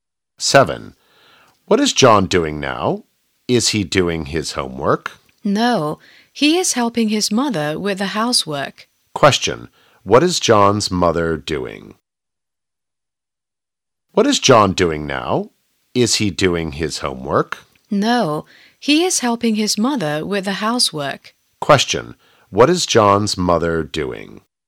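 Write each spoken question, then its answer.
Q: What is John's mother doing?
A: The housework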